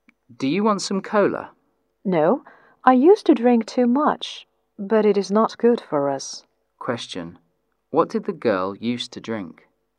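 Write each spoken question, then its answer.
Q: What did the girl used to drink?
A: Cola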